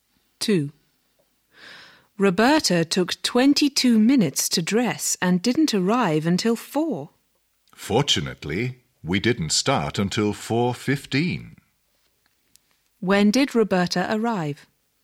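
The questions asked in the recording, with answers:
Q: When did Roberta arrive?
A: At 4 o'clock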